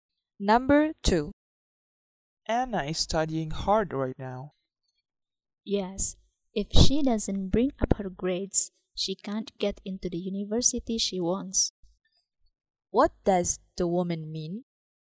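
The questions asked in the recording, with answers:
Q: What does the woman mean?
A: Anna must improve her grades to get into the university she wants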